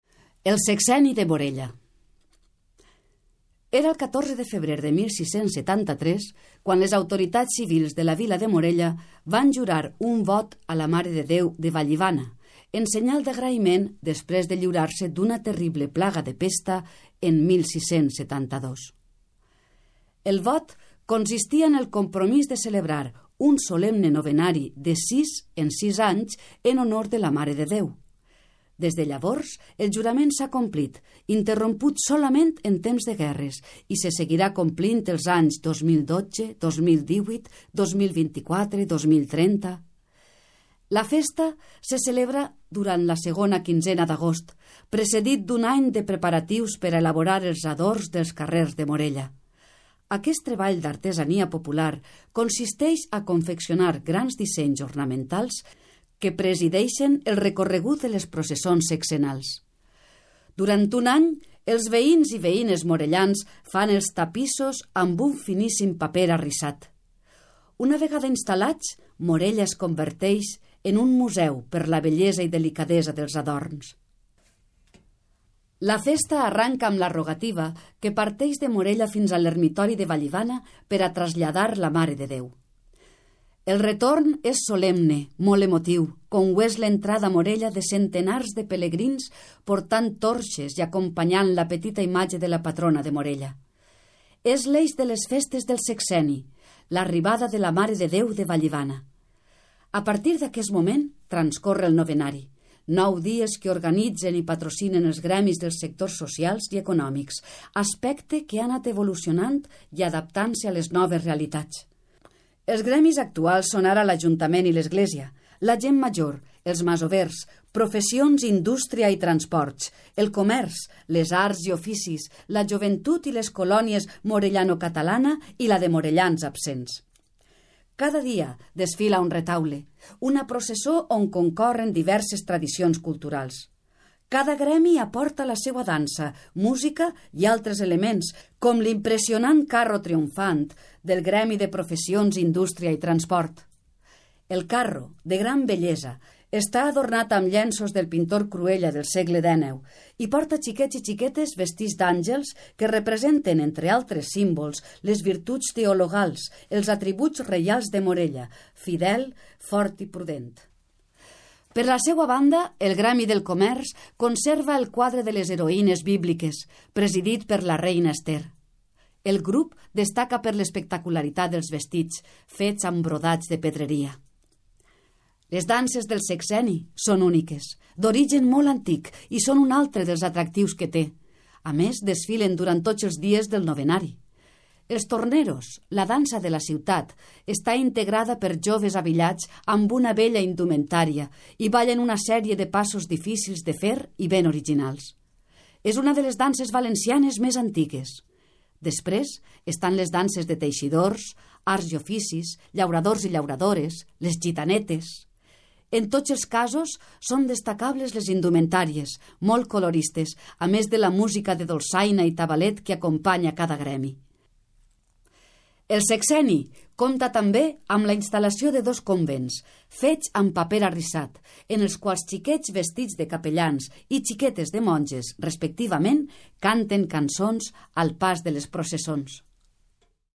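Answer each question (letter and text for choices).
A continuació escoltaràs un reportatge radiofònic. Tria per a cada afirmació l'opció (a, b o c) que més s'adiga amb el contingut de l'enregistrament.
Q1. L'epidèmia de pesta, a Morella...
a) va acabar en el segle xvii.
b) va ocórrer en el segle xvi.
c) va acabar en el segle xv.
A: a) va acabar en el segle xvii.

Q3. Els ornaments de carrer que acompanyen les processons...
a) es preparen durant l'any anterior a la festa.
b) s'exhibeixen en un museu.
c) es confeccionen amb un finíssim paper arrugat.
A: a) es preparen durant l'any anterior a la festa.

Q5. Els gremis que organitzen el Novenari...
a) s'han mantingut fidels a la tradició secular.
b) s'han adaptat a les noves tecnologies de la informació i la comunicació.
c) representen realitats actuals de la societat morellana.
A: c) representen realitats actuals de la societat morellana.

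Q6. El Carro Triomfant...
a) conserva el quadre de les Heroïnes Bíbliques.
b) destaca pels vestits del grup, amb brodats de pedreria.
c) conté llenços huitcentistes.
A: c) conté llenços huitcentistes.

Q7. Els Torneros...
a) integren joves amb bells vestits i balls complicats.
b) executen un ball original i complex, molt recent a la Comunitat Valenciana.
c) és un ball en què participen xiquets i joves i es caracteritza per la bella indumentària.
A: a) integren joves amb bells vestits i balls complicats.

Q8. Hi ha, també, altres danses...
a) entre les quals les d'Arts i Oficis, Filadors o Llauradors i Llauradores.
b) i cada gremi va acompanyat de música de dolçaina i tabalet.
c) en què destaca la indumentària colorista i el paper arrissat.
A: b) i cada gremi va acompanyat de música de dolçaina i tabalet.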